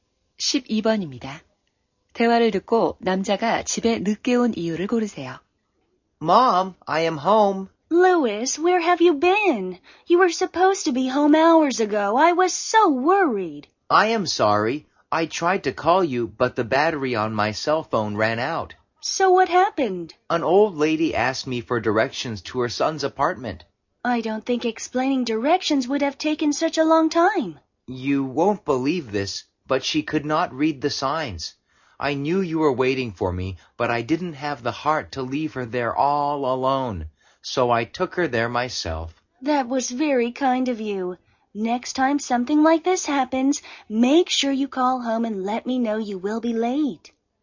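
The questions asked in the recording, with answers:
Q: 대화를 듣고 남자가 집에 늦게 온 이유를 고르세요.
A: 길을 잃은 할머니를 아들 집까지 모셔다 드려서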